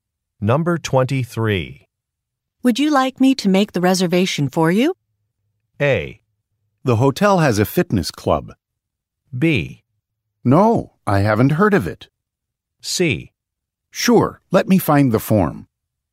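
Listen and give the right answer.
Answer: C: Sure, let me find the form.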